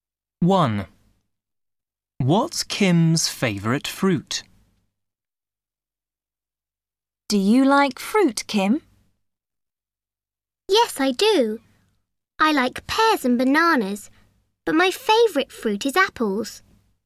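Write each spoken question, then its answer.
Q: What's Kim's favourite fruit?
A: apples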